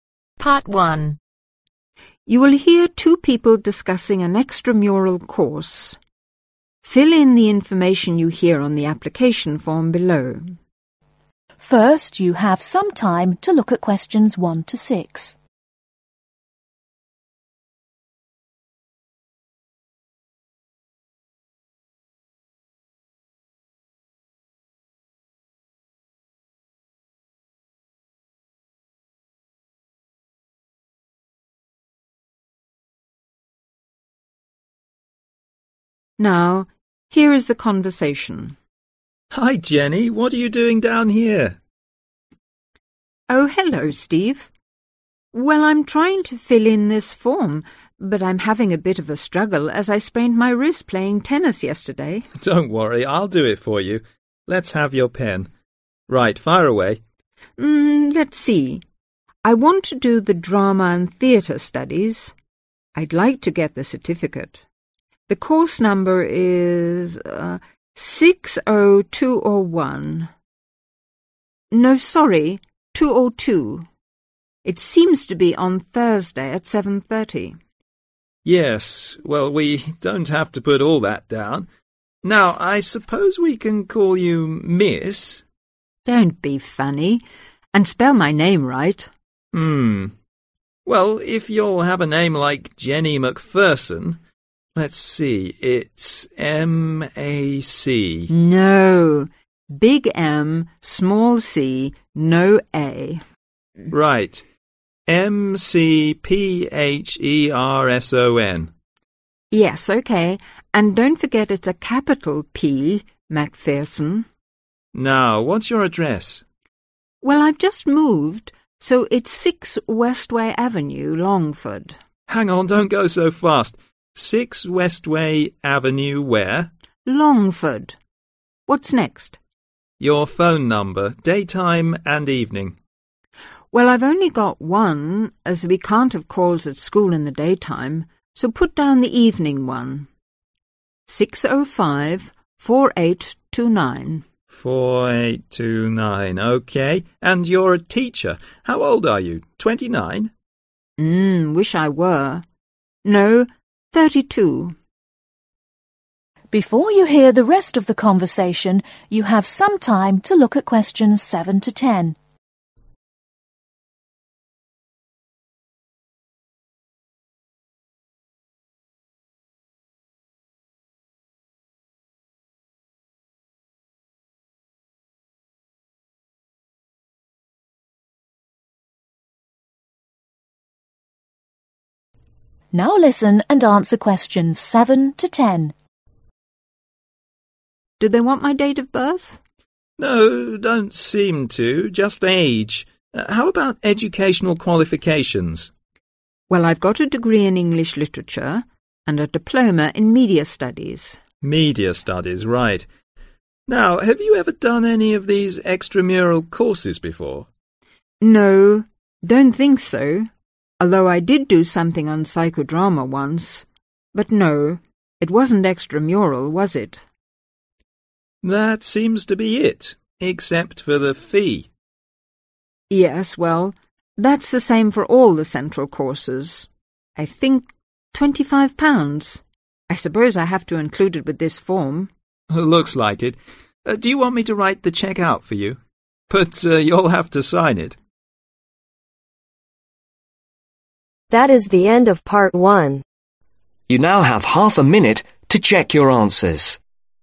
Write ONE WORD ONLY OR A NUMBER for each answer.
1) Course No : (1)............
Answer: 60202

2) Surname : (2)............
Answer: McPherson

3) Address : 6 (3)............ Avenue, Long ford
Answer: West way

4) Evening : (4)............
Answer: 6054829

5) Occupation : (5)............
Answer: Teacher

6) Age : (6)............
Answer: 32

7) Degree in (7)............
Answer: English Literature

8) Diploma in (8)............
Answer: Media Studies

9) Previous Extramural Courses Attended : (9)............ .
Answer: NO

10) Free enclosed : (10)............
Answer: 25 Pounds